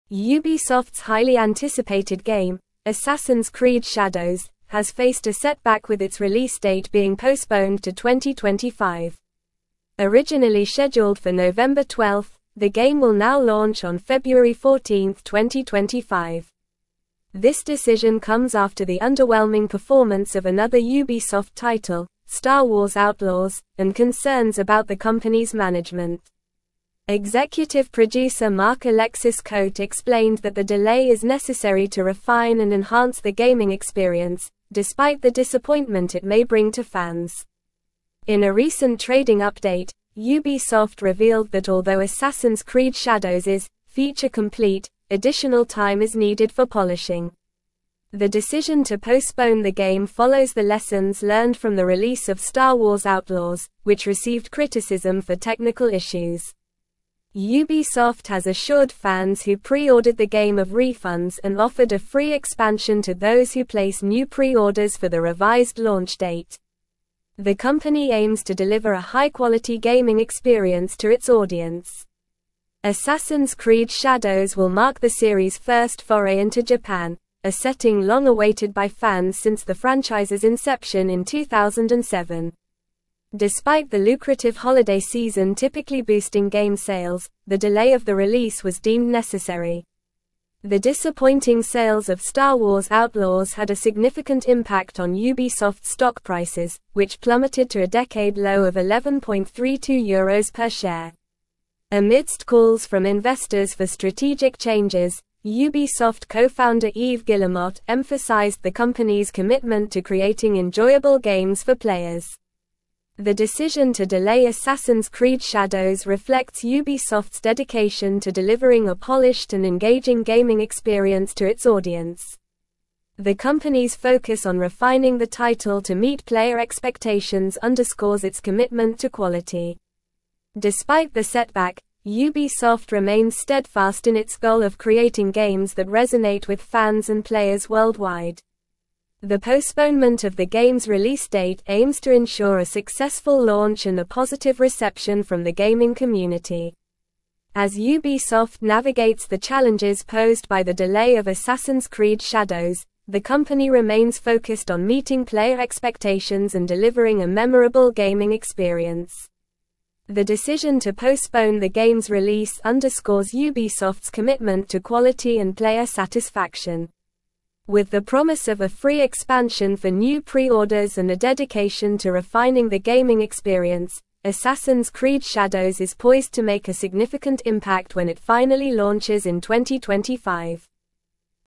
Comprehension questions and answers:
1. Ubisoft's highly-anticipated game, Assassin's Creed (1)______, has faced a setback with its release date being postponed to 2025.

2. Originally (2)______ for November 12, the game will now launch on February 14, 2025.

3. (3)______ producer Marc-Alexis Cote (4)______ that the delay is necessary to refine and enhance the gaming experience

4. (3)______ producer Marc-Alexis Cote (4)______ that the delay is necessary to refine and enhance the gaming experience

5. The decision to postpone the game follows the lessons learned from the release of Star Wars Outlaws, which received criticism for technical (5)______.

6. Ubisoft has assured fans who pre-ordered the game of refunds and offered a free (6)______ to those who place new pre-orders for the revised launch date.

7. The (7)______ aims to deliver a high-quality gaming experience to its audience.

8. Despite the lucrative holiday season typically boosting game sales, the delay of the release was (8)______ necessary.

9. The disappointing sales of Star Wars Outlaws had a significant impact on (9)______'s stock prices, which plummeted to a decade-low of 11.32 euros per share.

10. Ubisoft co-founder Yves Guillemot emphasized the company's (10)______ to creating (11)______ games for players.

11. Ubisoft co-founder Yves Guillemot emphasized the company's (10)______ to creating (11)______ games for players.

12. Despite the (12)______, Ubisoft remains steadfast in its goal of creating games that resonate with fans and players worldwide.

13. As Ubisoft navigates the challenges posed by the delay of Assassin's (13)______ Shadows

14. The decision to postpone the game's release underscores Ubisoft's commitment to (14)______ and player satisfaction.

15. Assassin's Creed Shadows is poised to make a significant (15)______ when it finally (16)______ in 2025.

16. Assassin's Creed Shadows is poised to make a significant (15)______ when it finally (16)______ in 2025.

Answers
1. Shadows
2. scheduled
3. Executive
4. explained
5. issues
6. expansion
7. company
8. deemed
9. Ubisoft
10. commitment
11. enjoyable
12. setback
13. Creed
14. quality
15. impact
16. launches

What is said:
Ubisoft's highly-anticipated game, Assassin's Creed Shadows, has faced a setback with its release date being postponed to 2025. Originally scheduled for November 12, the game will now launch on February 14, 2025. This decision comes after the underwhelming performance of another Ubisoft title, Star Wars Outlaws, and concerns about the company's management. Executive producer Marc-Alexis Cote explained that the delay is necessary to refine and enhance the gaming experience, despite the disappointment it may bring to fans.
In a recent trading update, Ubisoft revealed that although Assassin's Creed Shadows is "feature complete," additional time is needed for polishing. The decision to postpone the game follows the lessons learned from the release of Star Wars Outlaws, which received criticism for technical issues. Ubisoft has assured fans who pre-ordered the game of refunds and offered a free expansion to those who place new pre-orders for the revised launch date. The company aims to deliver a high-quality gaming experience to its audience.
Assassin's Creed Shadows will mark the series' first foray into Japan, a setting long-awaited by fans since the franchise's inception in 2007. Despite the lucrative holiday season typically boosting game sales, the delay of the release was deemed necessary. The disappointing sales of Star Wars Outlaws had a significant impact on Ubisoft's stock prices, which plummeted to a decade-low of 11.32 euros per share. Amidst calls from investors for strategic changes, Ubisoft co-founder Yves Guillemot emphasized the company's commitment to creating enjoyable games for players.
The decision to delay Assassin's Creed Shadows reflects Ubisoft's dedication to delivering a polished and engaging gaming experience to its audience. The company's focus on refining the title to meet player expectations underscores its commitment to quality. Despite the setback, Ubisoft remains steadfast in its goal of creating games that resonate with fans and players worldwide. The postponement of the game's release date aims to ensure a successful launch and a positive reception from the gaming community.
As Ubisoft navigates the challenges posed by the delay of Assassin's Creed Shadows, the company remains focused on meeting player expectations and delivering a memorable gaming experience. The decision to postpone the game's release underscores Ubisoft's commitment to quality and player satisfaction. With the promise of a free expansion for new pre-orders and a dedication to refining the gaming experience, Assassin's Creed Shadows is poised to make a significant impact when it finally launches in 2025.

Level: Level 4